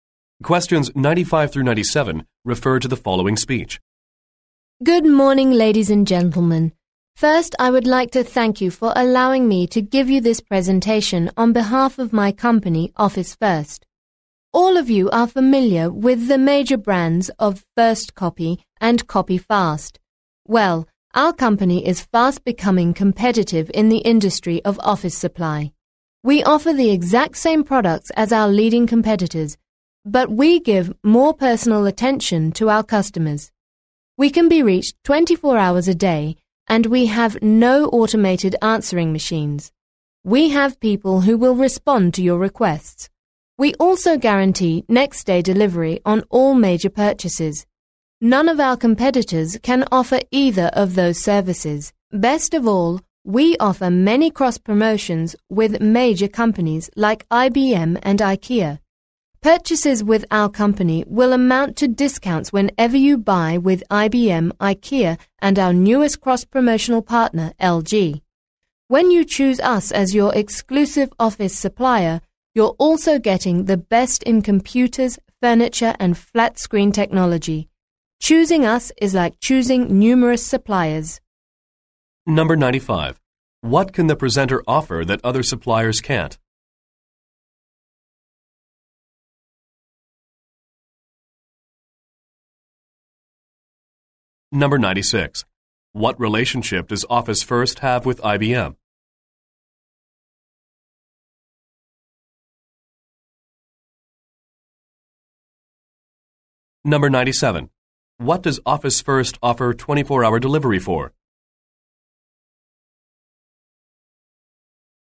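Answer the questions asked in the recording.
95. 24-hour availability with live people and guaranteed next-day delivery
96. Cross-promotional partners
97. All major purchases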